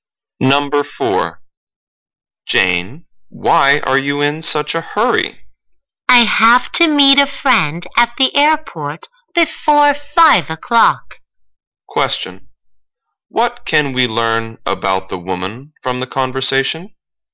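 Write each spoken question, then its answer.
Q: What can we learn about the woman from the conversation?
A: She has to meet a friend at the airport before 5:00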